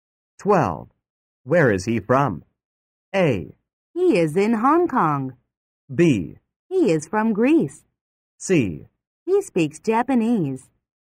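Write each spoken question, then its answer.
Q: Where is he from?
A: B: He is from Greece.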